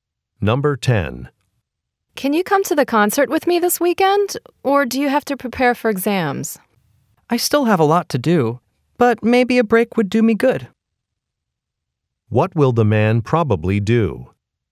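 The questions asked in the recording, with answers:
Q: What will the man probably do?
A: Go to the concert.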